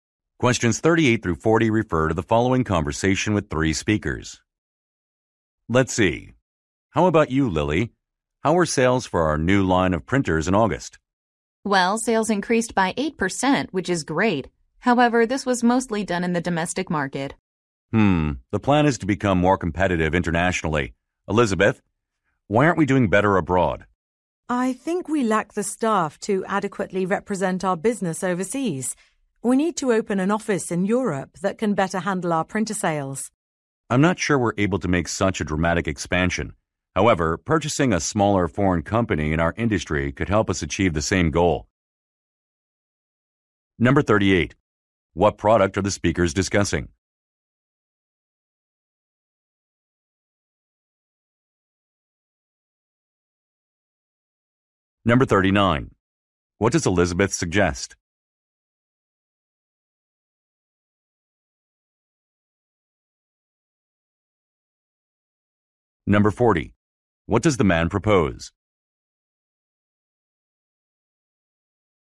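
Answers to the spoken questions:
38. Printers.
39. Opening an office in Europe.
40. Buying a smaller foreign company in their industry.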